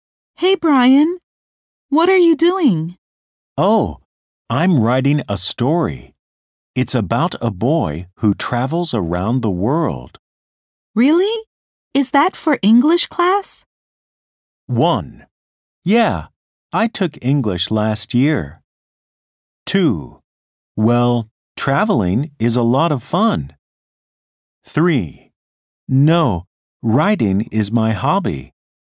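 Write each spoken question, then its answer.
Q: Really? Is that for English class?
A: 3: No, writing is my hobby.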